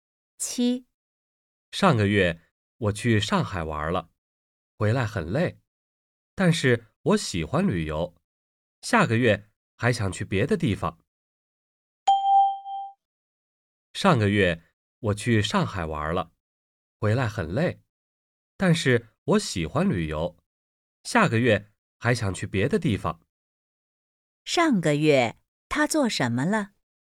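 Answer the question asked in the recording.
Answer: 去上海玩了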